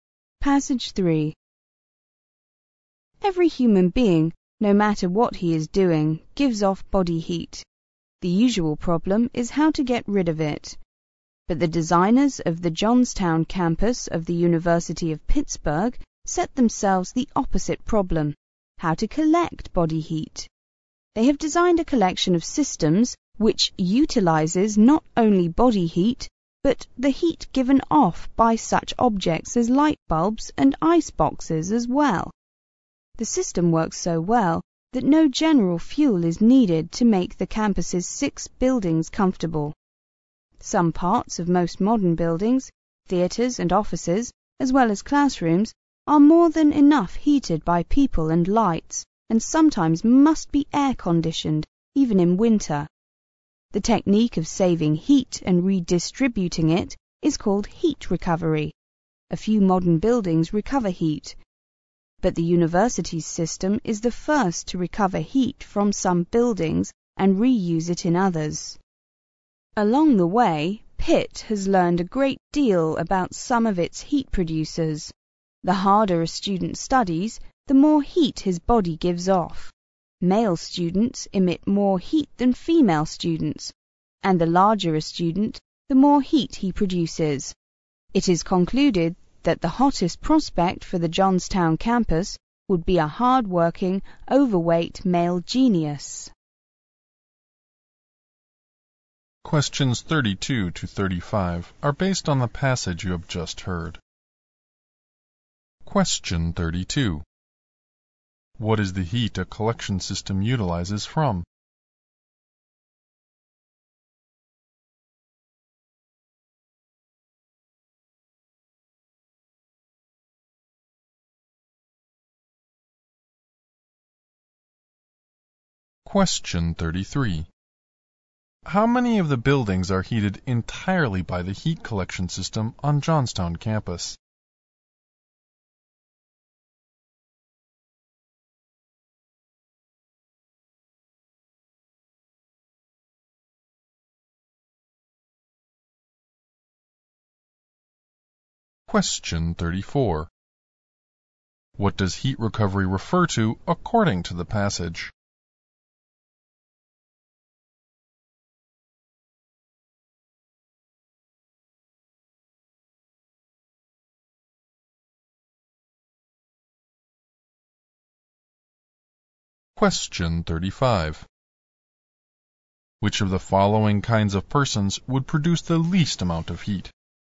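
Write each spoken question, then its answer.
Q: What is the heat a collection system utilizes from?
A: Body heat and heat from objects like light bulbs and ice boxes.

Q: How many of the buildings are heated entirely by the heat collection system on Johnstown campus?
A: Six.

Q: What does heat recovery refer to according to the passage?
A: Saving heat and redistributing it.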